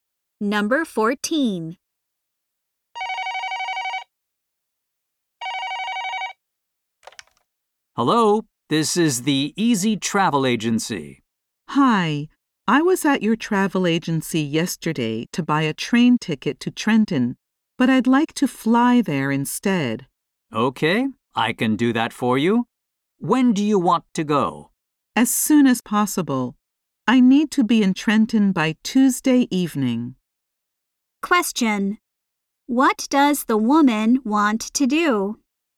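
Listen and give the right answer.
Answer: Fly to Trenton instead of taking the train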